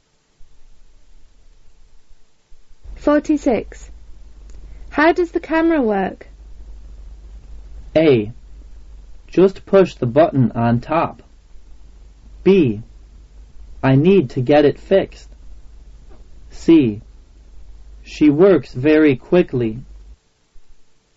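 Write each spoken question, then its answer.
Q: How does the camera work?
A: A: Just push the button on top.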